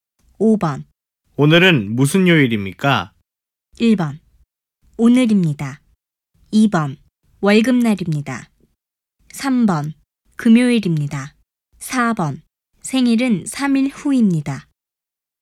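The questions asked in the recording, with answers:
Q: 오늘은 무슨 요일입니까?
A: 3: 금요일입니다.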